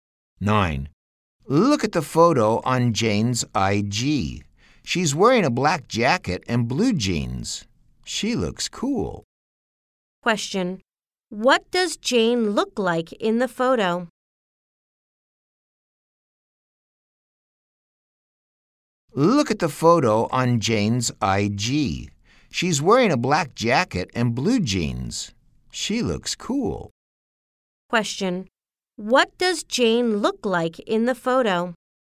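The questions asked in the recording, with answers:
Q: What does Jane look like in the photo?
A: She's wearing a black jacket and blue jeans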